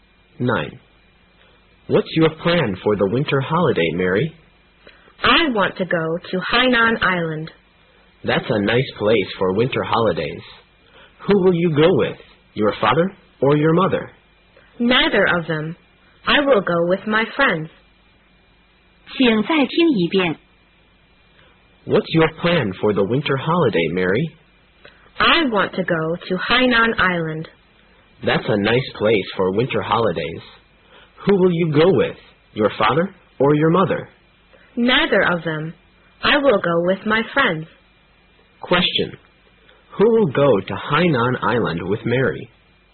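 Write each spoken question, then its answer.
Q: Who will go to Hainan Island with Mary?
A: Her friends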